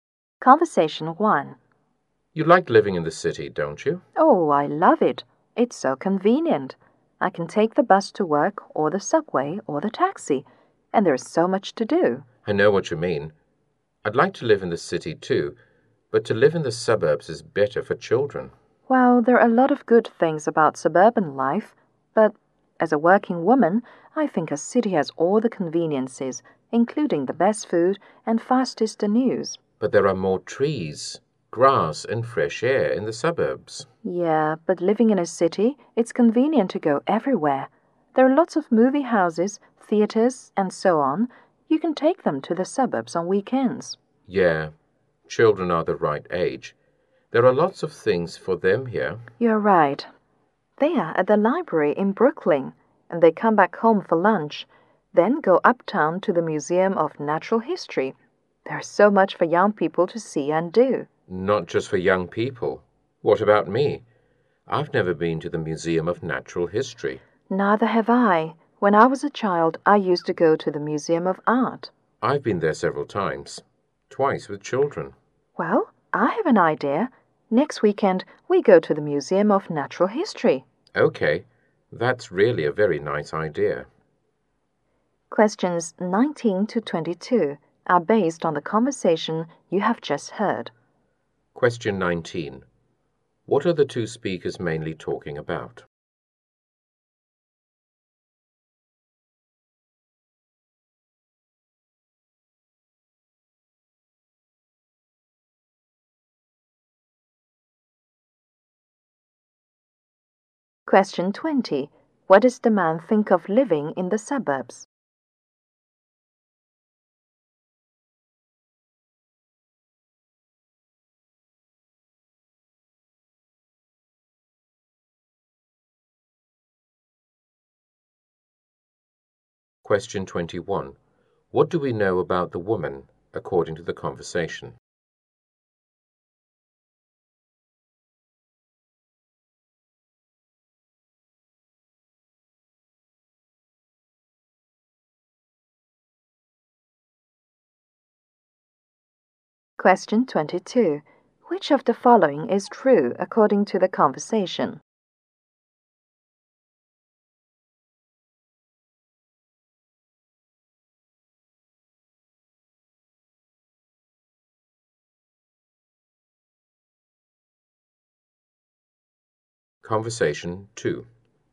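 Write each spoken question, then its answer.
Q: What are the two speakers mainly talking about?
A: Whether city life or suburban life is better

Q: What does the man think of living in the suburbs?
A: It is better for children, with more trees, grass and fresh air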